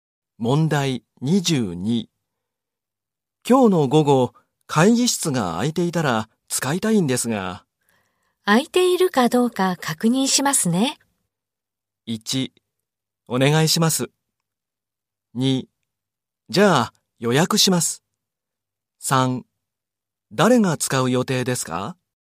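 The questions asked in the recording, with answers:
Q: 今日の午後、会議室が空いていたら使いたいんですが。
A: 1: お願いします。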